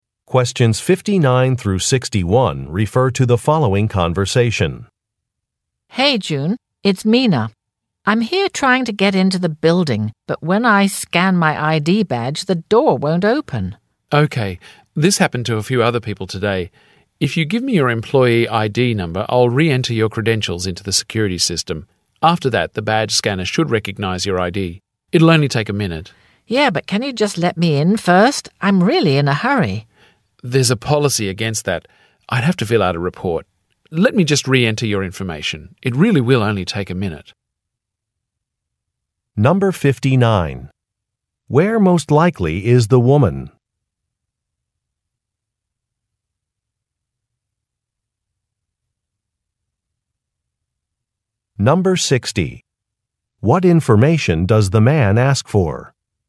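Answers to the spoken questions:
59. Outside the building entrance
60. Her employee ID number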